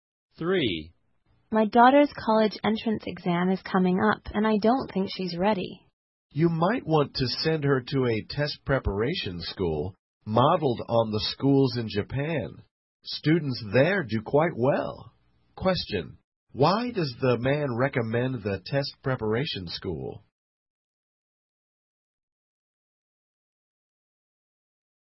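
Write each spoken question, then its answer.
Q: why does the man recommend the test preparation school?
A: Students there do quite well.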